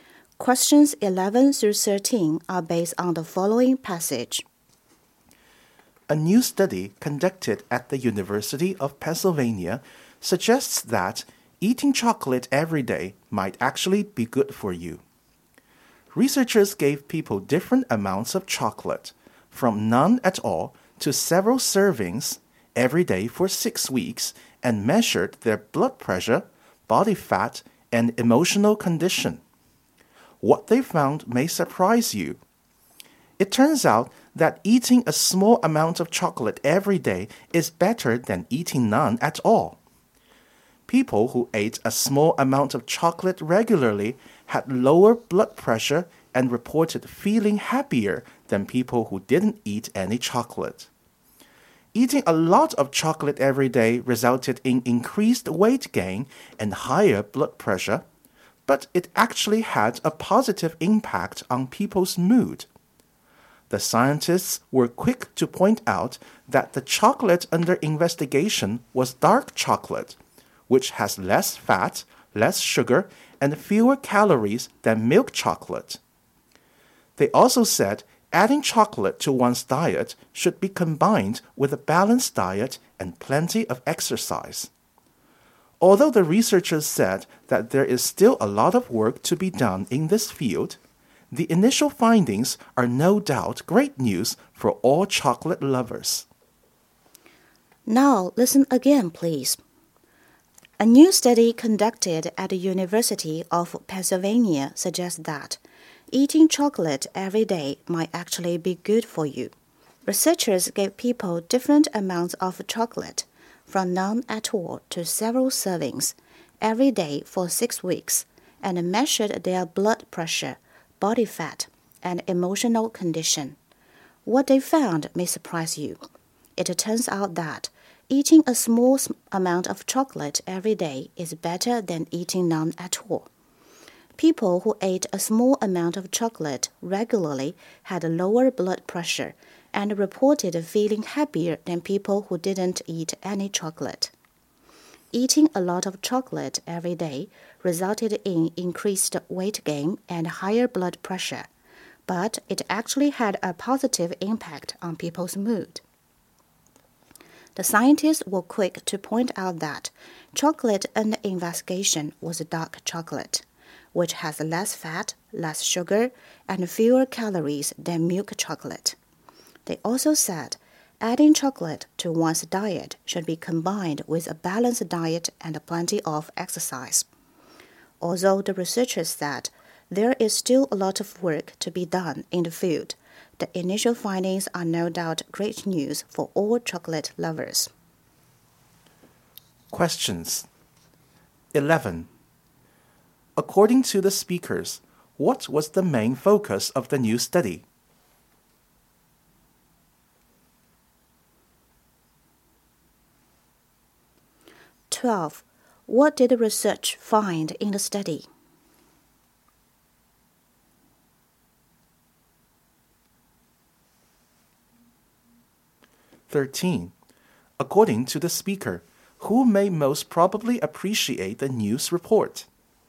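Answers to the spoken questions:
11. The health effects of eating chocolate every day
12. Eating a small amount of chocolate daily is better than none
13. Chocolate lovers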